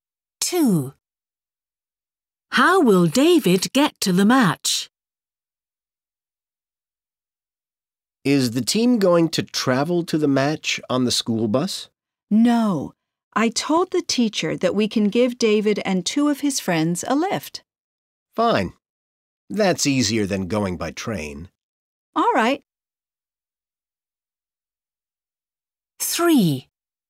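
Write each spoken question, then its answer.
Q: How will David get to the match?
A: By car (they give him a lift)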